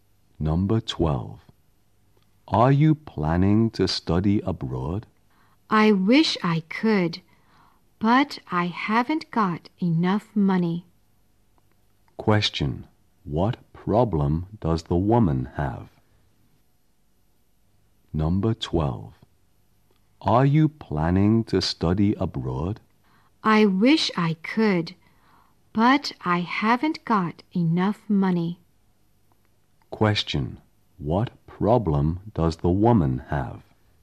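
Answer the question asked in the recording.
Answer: She hasn't got enough money to study abroad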